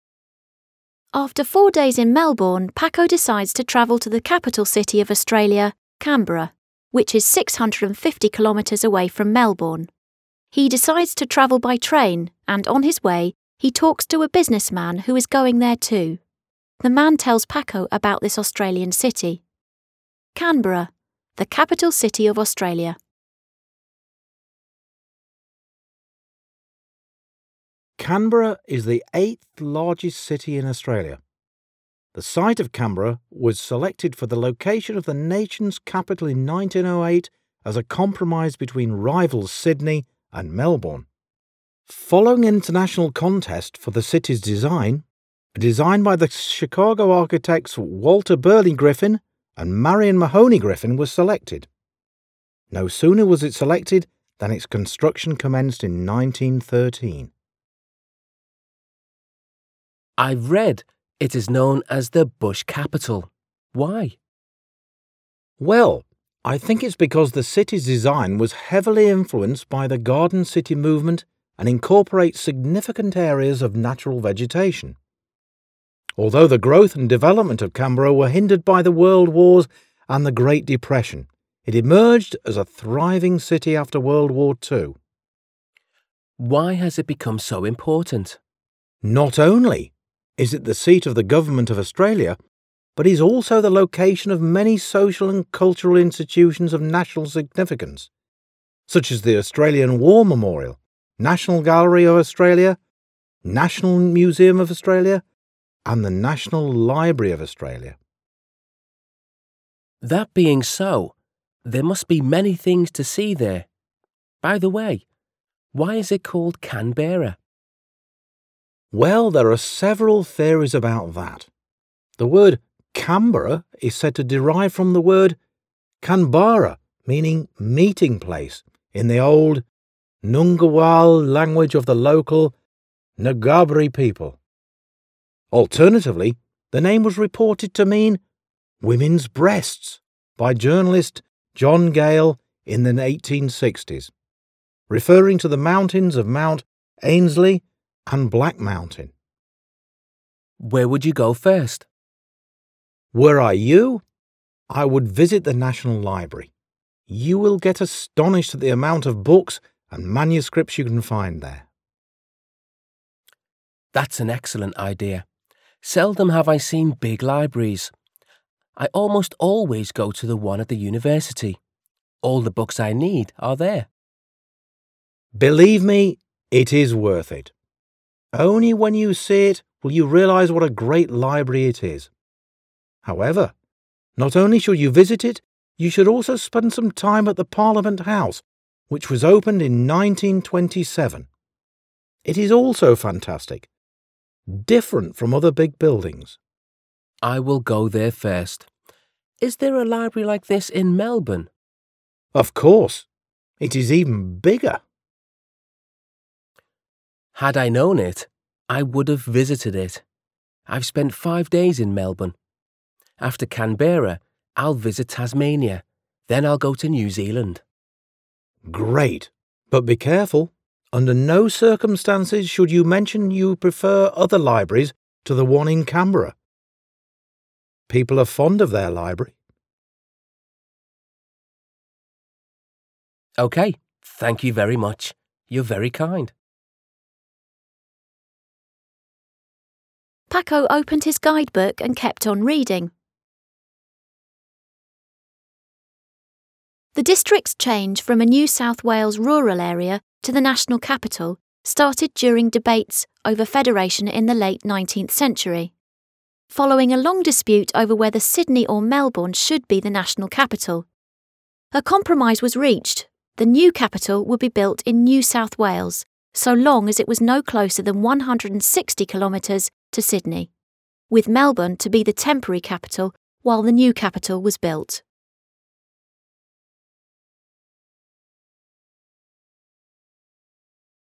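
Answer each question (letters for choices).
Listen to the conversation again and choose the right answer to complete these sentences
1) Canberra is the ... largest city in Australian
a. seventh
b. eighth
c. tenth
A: b

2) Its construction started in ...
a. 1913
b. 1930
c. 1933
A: a

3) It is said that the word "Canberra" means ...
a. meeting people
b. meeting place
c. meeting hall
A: b

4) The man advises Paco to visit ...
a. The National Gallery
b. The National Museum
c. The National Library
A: c

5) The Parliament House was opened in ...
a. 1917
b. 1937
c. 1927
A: c

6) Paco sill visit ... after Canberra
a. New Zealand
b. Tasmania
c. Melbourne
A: b

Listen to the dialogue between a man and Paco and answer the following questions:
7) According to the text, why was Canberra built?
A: As a compromise between rivals Sydney and Melbourne for the nation's capital

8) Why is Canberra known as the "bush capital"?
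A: Its design was influenced by the Garden City movement and includes large areas of natural vegetation

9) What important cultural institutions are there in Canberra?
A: The Australian War Memorial, National Gallery, National Museum and National Library of Australia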